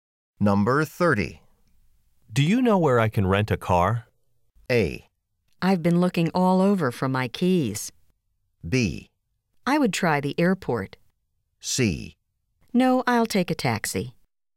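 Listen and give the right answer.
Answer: B: I would try the airport.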